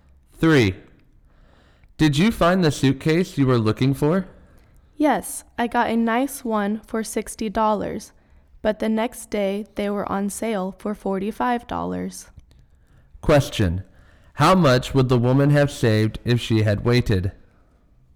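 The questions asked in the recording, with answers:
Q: How much would the woman have saved if she had waited?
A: $15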